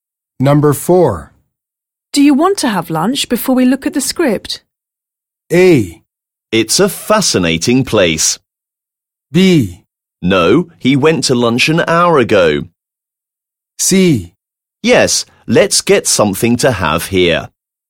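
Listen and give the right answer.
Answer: C: Yes, let's get something to have here.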